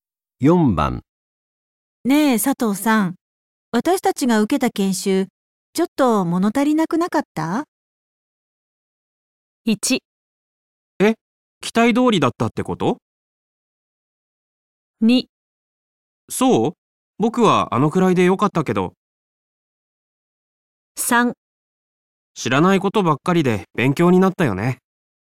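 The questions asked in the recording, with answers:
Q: ねえ佐藤さん、私たちが受けた研修、ちょっと物足りなくなかった?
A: 2: そう?僕はあのくらいでよかったけど。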